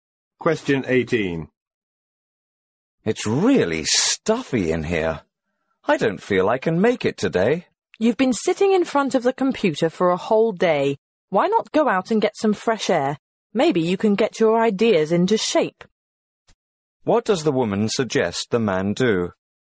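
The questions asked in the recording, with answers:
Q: What does the woman suggest the man do?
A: Go out and get some fresh air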